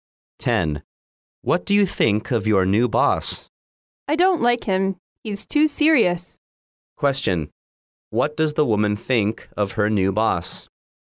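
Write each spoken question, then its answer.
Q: What does the woman think of her new boss?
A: He's too serious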